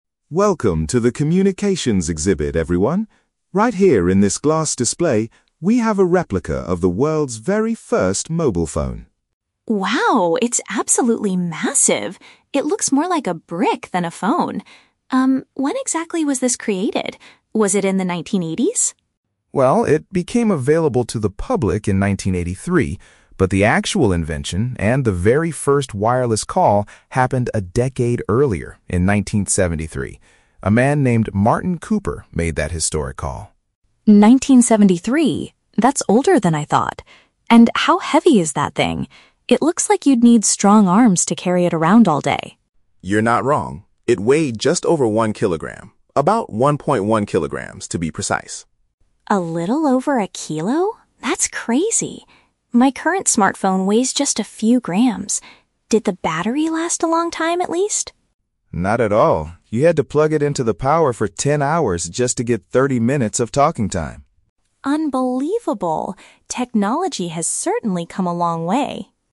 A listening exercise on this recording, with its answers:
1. When was the first mobile phone officially invented?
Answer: In 1973.

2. What does the guide say about the weight of the old device?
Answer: It was slightly heavier than one kilogram.

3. What do we learn about the battery of this early invention?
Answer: It required almost half a day to fully recharge.

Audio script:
David: Welcome to the communications exhibit, everyone. Right here in this glass display, we have a replica of the world's very first mobile phone.
Anna: Wow, it's absolutely massive! It looks more like a brick than a phone. Um, when exactly was this created? Was it in the 1980s?
David: Well, it became available to the public in 1983, but the actual invention and the very first wireless call happened a decade earlier, in 1973. A man named Martin Cooper made that historic call.
Anna: 1973? That's older than I thought. And how heavy is that thing? It looks like you'd need strong arms to carry it around all day.
David: You're not wrong! It weighed just over one kilogram—about 1.1 kilograms, to be precise.
Anna: A little over a kilo? That's crazy. My current smartphone weighs just a few grams. Did the battery last a long time, at least?
David: Not at all. You had to plug it into the power for ten hours just to get thirty minutes of talking time!